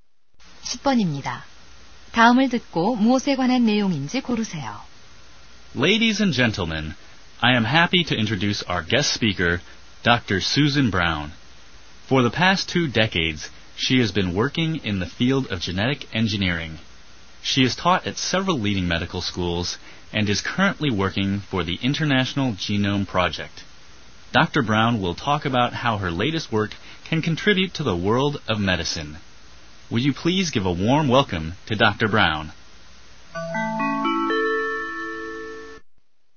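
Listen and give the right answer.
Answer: 초청 연사 소개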